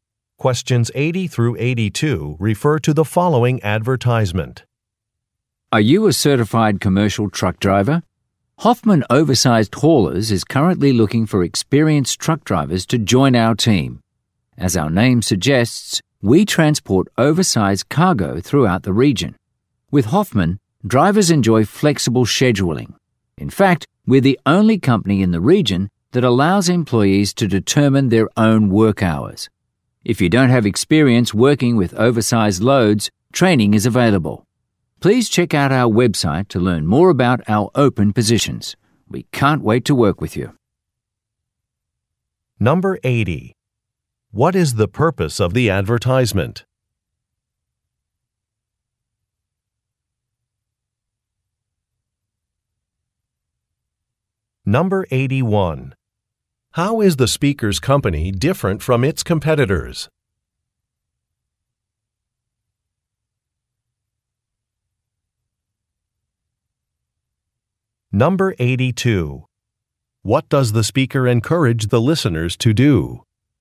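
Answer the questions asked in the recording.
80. To recruit truck drivers
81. Employees set their own work hours
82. Check out the website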